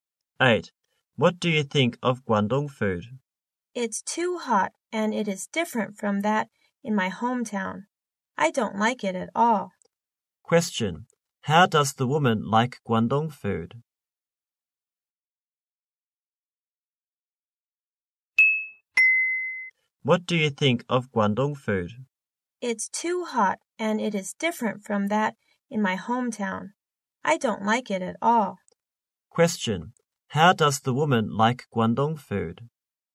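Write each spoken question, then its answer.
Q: How does the woman like Guangdong food?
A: She doesn't like it at all; it's too hot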